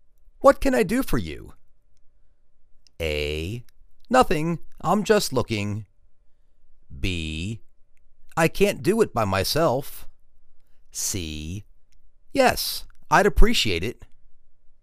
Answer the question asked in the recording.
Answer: Nothing. I'm just looking.